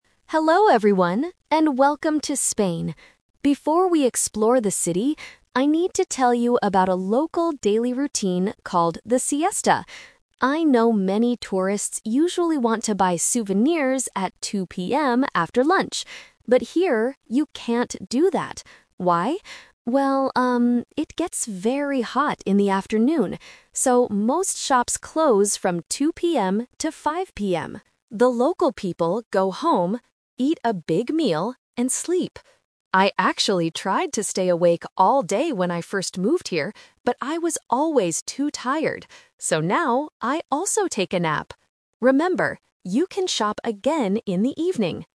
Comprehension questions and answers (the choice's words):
Listen to the tour guide and choose the correct answer (A, B, or C).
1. What do tourists usually want to do at 2:00 PM?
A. Buy souvenirs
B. Sleep at the hotel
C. Eat a big meal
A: Buy souvenirs

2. What time do the shops open again in the afternoon?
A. At 2:00 PM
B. At 5:00 PM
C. At 6:00 PM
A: At 5:00 PM

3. What does the tour guide do in the afternoon now?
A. She stays awake all day.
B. She goes shopping.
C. She takes a nap.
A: She takes a nap.

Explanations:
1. The tour guide says, "I know many tourists usually want to buy souvenirs at 2:00 PM." Options B and C are traps because sleeping and eating a big meal are what the local people do, not the tourists.
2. The guide says the shops close "from 2:00 PM to 5:00 PM," which means they open again at 5:00 PM. Option A (2:00 PM) is a trap because it is the time the shops close, not open. Option C is not mentioned.
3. The tour guide says, "So now, I also take a nap!" Option A (stays awake) is a trap because she tried to do this in the past, but she was too tired. Option B is a trap because tourists want to shop, not the guide.

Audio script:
Tour Guide: Hello everyone, and welcome to Spain! Before we explore the city, I need to tell you about a local daily routine called the 'Siesta'. I know many tourists usually want to buy souvenirs at 2:00 PM after lunch. But here, you can't do that. Why? Well, um, it gets very hot in the afternoon. So, most shops close from 2:00 PM to 5:00 PM. The local people go home, eat a big meal, and sleep. I actually tried to stay awake all day when I first moved here, but I was always too tired. So now, I also take a nap! Remember, you can shop again in the evening.

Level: A2